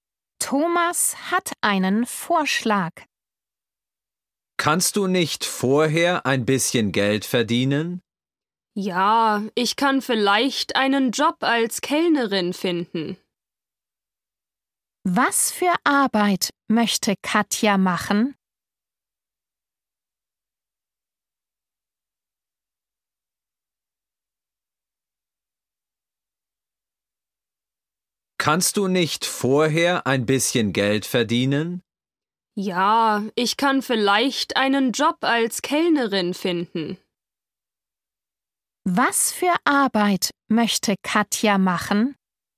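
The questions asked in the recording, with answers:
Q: Was für Arbeit möchte Katja machen?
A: Als Kellnerin arbeiten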